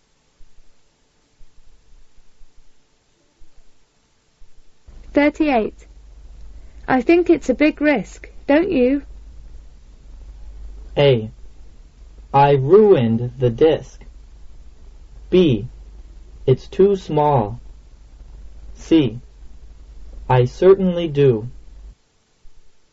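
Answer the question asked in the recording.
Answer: C: I certainly do.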